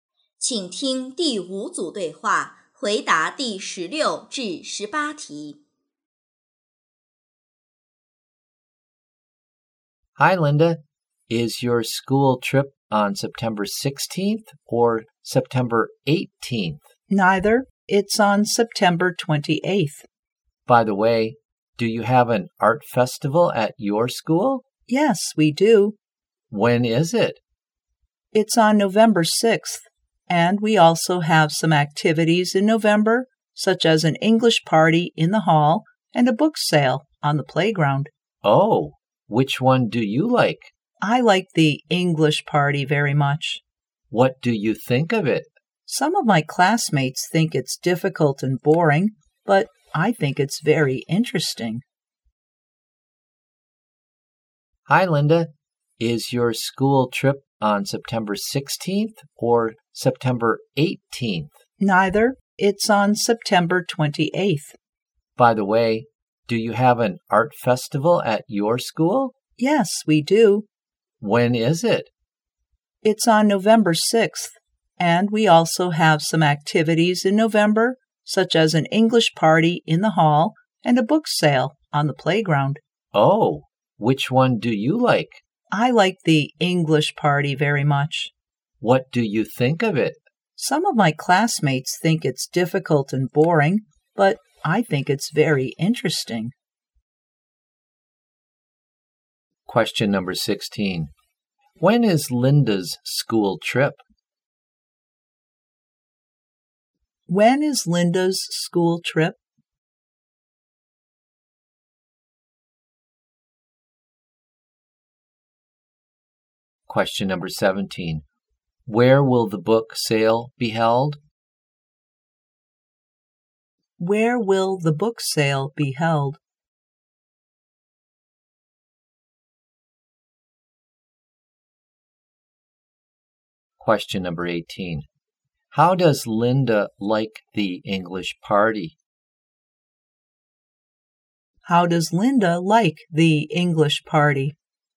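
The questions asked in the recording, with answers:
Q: When is Linda's school trip?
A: On September 28th

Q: Where will the book sale be held?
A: On the playground

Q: How does Linda like the English party?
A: She thinks it's very interesting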